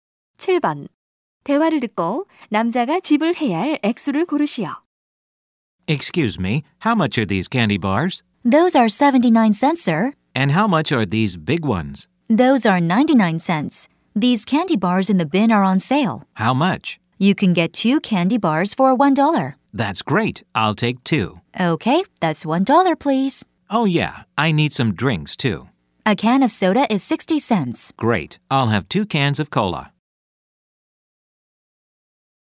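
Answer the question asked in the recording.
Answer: $2.20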